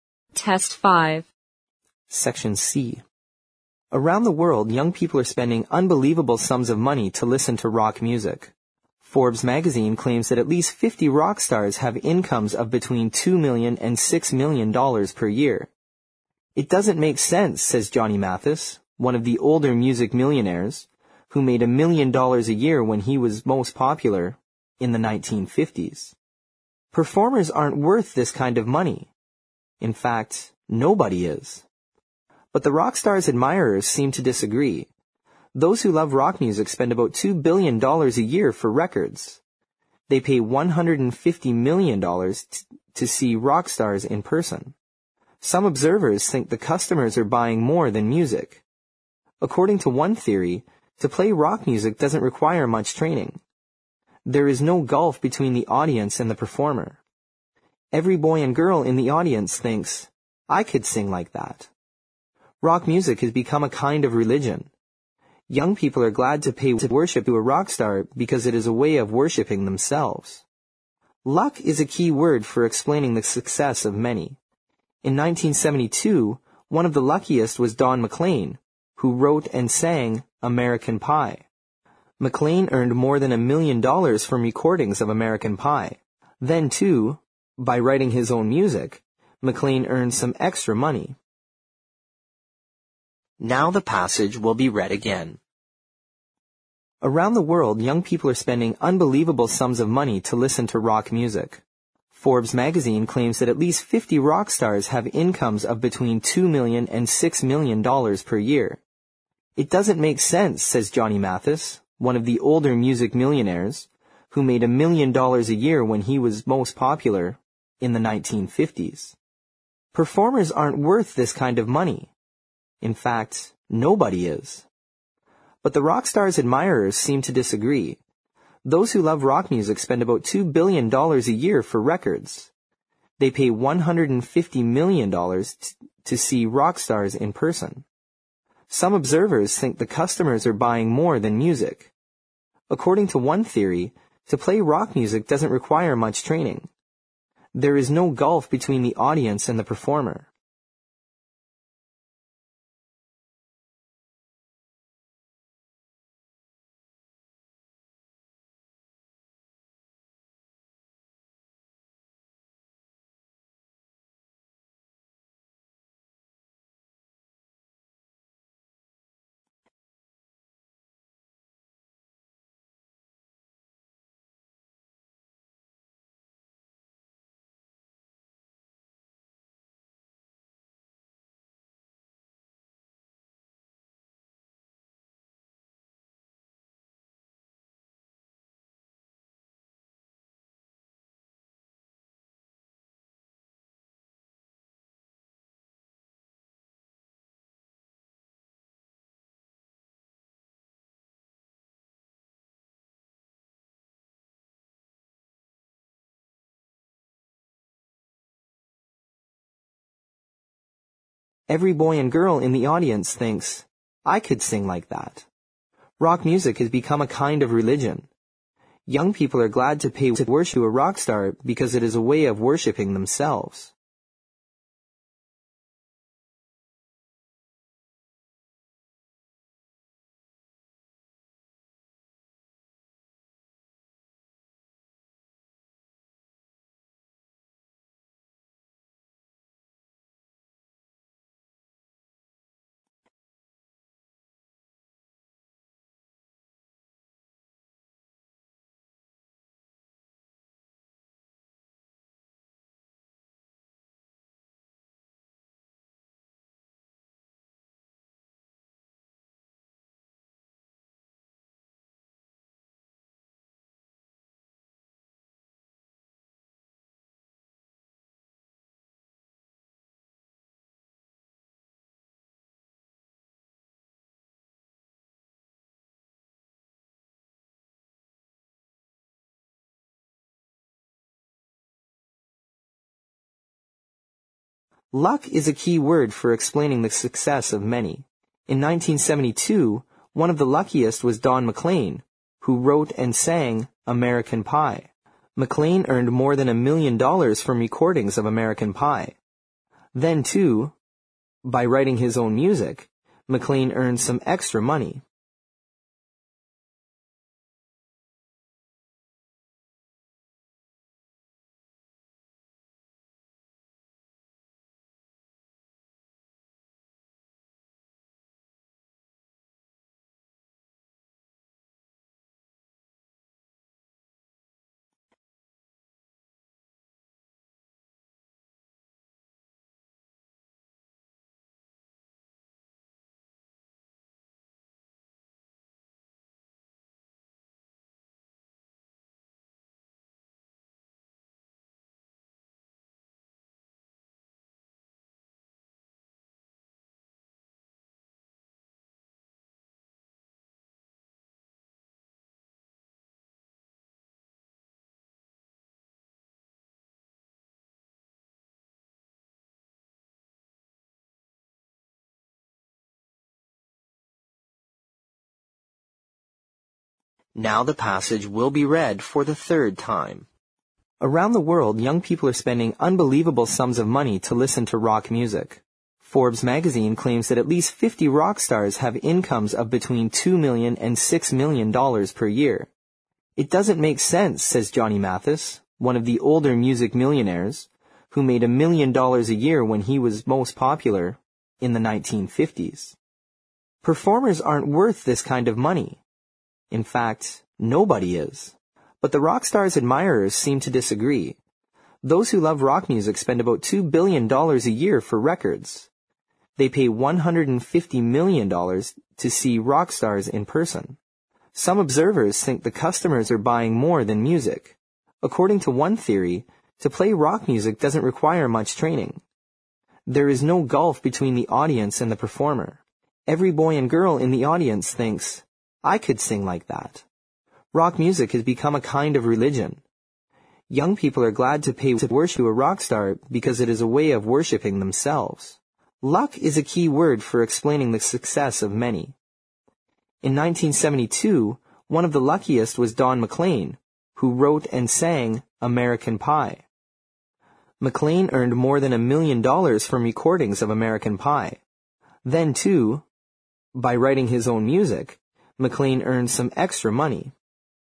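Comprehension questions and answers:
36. Forbes Magazine (36) ______ that at least fifty rock stars have (37) ______ of between two million and six million dollars per year.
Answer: claims

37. Forbes Magazine (36) ______ that at least fifty rock stars have (37) ______ of between two million and six million dollars per year.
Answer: incomes

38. one of the older music (38) ______ , who made a million dollars a year when he was most (39) ______ , in the 1950s.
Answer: millionaires

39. one of the older music (38) ______ , who made a million dollars a year when he was most (39) ______ , in the 1950s.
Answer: popular

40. (40) ______ aren't worth this kind of money.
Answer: Performers

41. But the rock stars' (41) ______ seem to disagree.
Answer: admirers

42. Those who love rock music spend about two billion dollars a year for (42) ______ .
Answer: records

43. Some observers think the (43) ______ are buying more than music.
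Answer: customers

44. (44)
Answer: There is no gulf between the audience and the performer.

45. (45)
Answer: Young people are glad to pay to worship a rock star because it is a way of worshiping themselves.

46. (46)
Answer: Then too, by writing his own music, McLean earned some extra money.

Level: 四级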